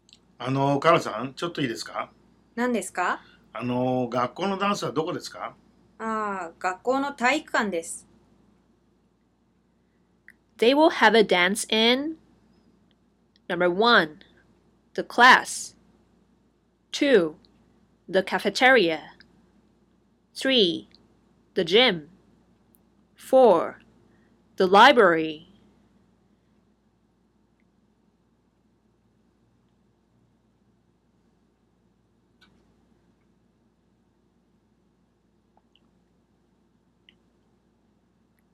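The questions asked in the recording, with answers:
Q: They will have a dance in Number 1 The class 2 The cafeteria 3 The gym 4 The library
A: 3: The gym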